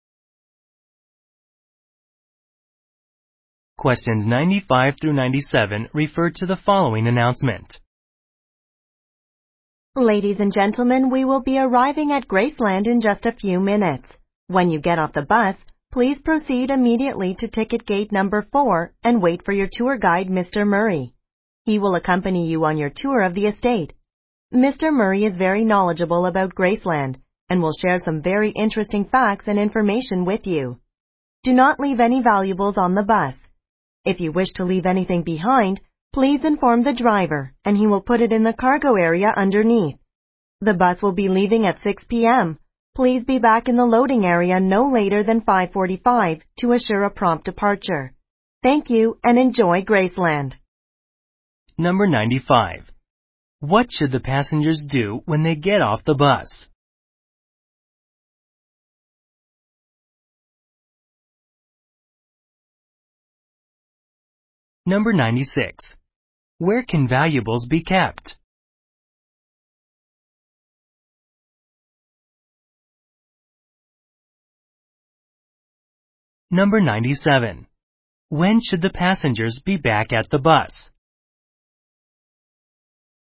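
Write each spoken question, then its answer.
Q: What should the passengers do when they get off the bus?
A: Go to ticket gate 4 and wait for the guide

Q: Where can valuables be kept?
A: In the cargo area under the bus

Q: When should the passengers be back at the bus?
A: By 5:45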